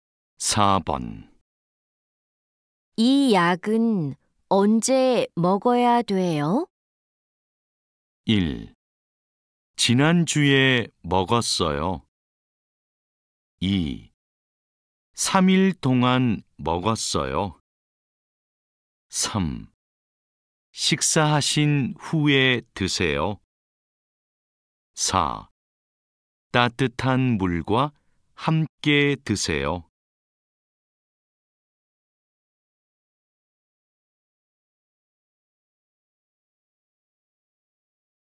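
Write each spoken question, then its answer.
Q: 이 약은 언제 먹어야 돼요?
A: 3: 식사하신 후에 드세요.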